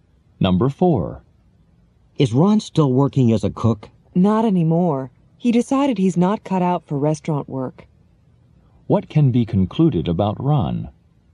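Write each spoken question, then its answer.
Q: What can be concluded about Ron?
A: He is no longer a cook; restaurant work didn't suit him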